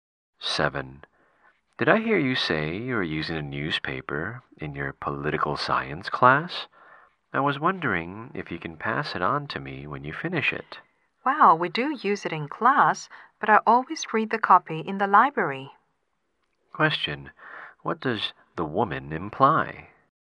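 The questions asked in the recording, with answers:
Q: What does the woman imply?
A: She doesn't have her own copy of the newspaper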